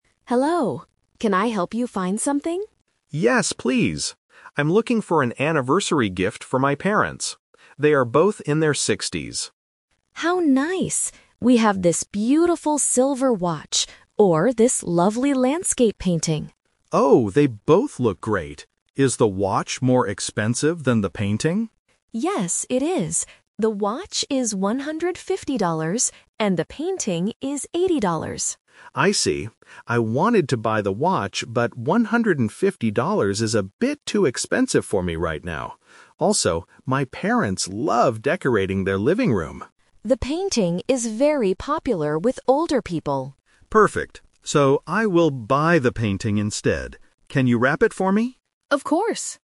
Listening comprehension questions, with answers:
Listen to the conversation between a customer and a shop assistant. Choose the correct answer (A, B, or C) for each question.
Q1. What is the customer buying a gift for?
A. A birthday.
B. An anniversary.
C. A retirement party.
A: An anniversary.

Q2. Which item is more expensive?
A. The silver watch.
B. The landscape painting.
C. The gift box.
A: The silver watch.

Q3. What does the customer decide to buy at the end?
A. The silver watch.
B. Both the watch and the painting.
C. The landscape painting.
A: The landscape painting.

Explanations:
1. The customer clearly says, "I'm looking for an anniversary gift for my parents." Option (A) is a trap because the customer mentions "in their sixties", which might make students think of a birthday. Option (C) is plausible for older people but is not mentioned.
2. The customer asks if the watch is more expensive, and the assistant replies, "Yes, it is. The watch is $150, and the painting is $80." Option (B) is the cheaper item. Option (C) is not mentioned in the audio.
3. This is "The Twist". The customer wanted the watch at first (Option A - the trap), but it was too expensive. The customer says, "So, I will buy the painting instead." Option (B) is incorrect because the customer only buys one item.

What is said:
Shop Assistant: Hello. Can I help you find something?
Customer: Yes, please. I'm looking for an anniversary gift for my parents. They are both in their sixties.
Shop Assistant: How nice! We have this beautiful silver watch or this lovely landscape painting.
Customer: Oh, they both look great. Is the watch more expensive than the painting?
Shop Assistant: Yes, it is. The watch is $150, and the painting is $80.
Customer: I see. I wanted to buy the watch, but $150 is a bit too expensive for me right now. Also, my parents love decorating their living room.
Shop Assistant: The painting is very popular with older people.
Customer: Perfect. So, I will buy the painting instead. Can you wrap it for me?

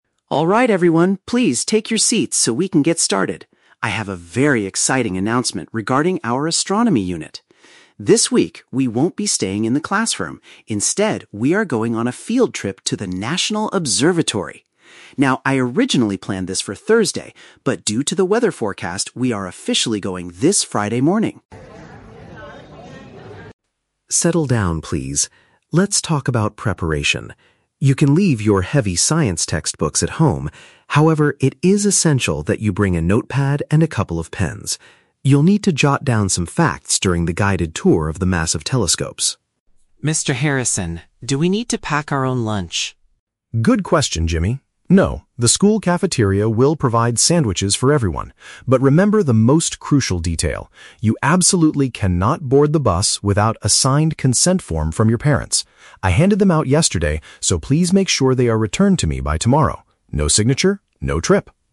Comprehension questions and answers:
Listen to a teacher making an announcement to his class and choose the correct answer (A, B, or C) for each question.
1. When is the class going to visit the National Observatory?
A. One day before Friday.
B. At the end of the school week.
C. Over the weekend.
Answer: At the end of the school week.

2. What are the students required to bring with them?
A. Their main science textbooks.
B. Their own food and drinks.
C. Materials for taking notes.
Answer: Materials for taking notes.

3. What is the strict condition for students to go on the trip?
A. They must submit a document approved by a family member.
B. They must return all their library books by tomorrow.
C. They must pay a small fee for the bus transportation.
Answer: They must submit a document approved by a family member.

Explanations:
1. The teacher says they are "officially going this Friday morning." Friday is the end of the school week. Option (A) is The Trap: "One day before Friday" is Thursday, which was the original plan, but the teacher changed it due to the weather. Option (C) is plausible but is not mentioned.
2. The teacher tells the students to "bring a notepad and a couple of pens" to "jot down some facts." This is a paraphrase for note-taking materials. Option (A) is The Trap: The teacher mentions "heavy science textbooks" but explicitly tells them to "leave [them] at home." Option (B) is also a trap: The student asks about lunch, but the teacher says they don't need to pack it because the school will provide sandwiches.
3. The teacher states they cannot board the bus without a "signed consent form from your parents" (document approved by a family member). Option (B) is The Trap: The teacher says "returned to me by tomorrow," but he is talking about returning the signed forms, not books. Option (C) is not mentioned.

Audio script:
Harrison: Alright everyone, please take your seats so we can get started. I have a very exciting announcement regarding our astronomy unit. This week, we won't be staying in the classroom. Instead, we are going on a field trip to the National Observatory! Now, I originally planned this for Thursday, but due to the weather forecast, we are officially going this Friday morning.
Mr. Harrison: Settle down, please. Let's talk about preparation. You can leave your heavy science textbooks at home. However, it is essential that you bring a notepad and a couple of pens. You'll need to jot down some facts during the guided tour of the massive telescopes.
Student (Jimmy): Mr. Harrison, do we need to pack our own lunch?
Mr. Harrison: Good question, Jimmy. No, the school cafeteria will provide sandwiches for everyone. But remember the most crucial detail: you absolutely cannot board the bus without a signed consent form from your parents. I handed them out yesterday, so please make sure they are returned to me by tomorrow. No signature, no trip!

